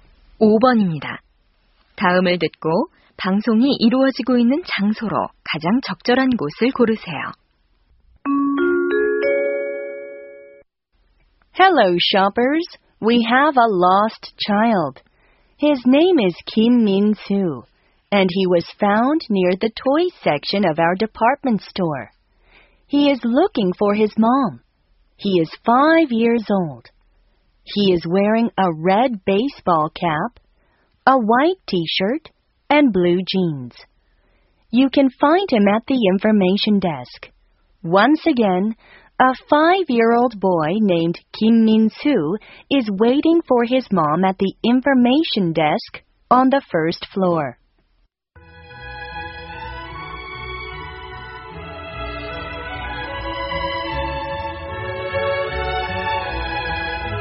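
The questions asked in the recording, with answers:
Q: 다음을 듣고 방송이 이루어지고 있는 장소로 가장 적절한 곳을 고르세요.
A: 백화점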